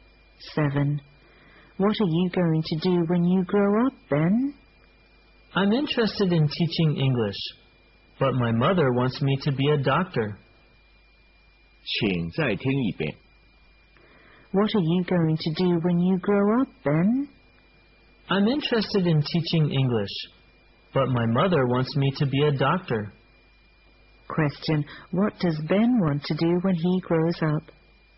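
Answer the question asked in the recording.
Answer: Teach English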